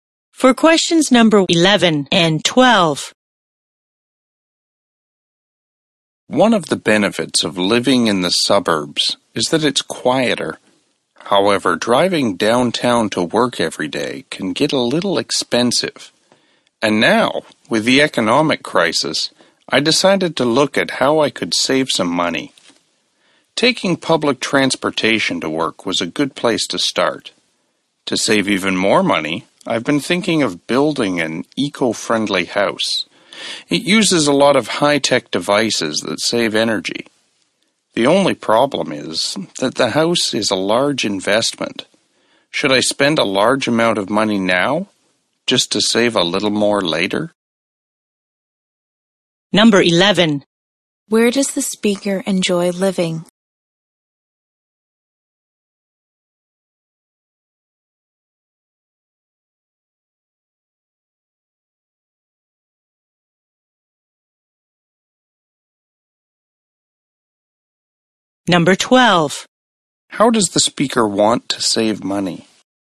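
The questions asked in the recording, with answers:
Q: Where does the speaker enjoy living?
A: In the suburbs

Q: How does the speaker want to save money?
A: By building an eco-friendly house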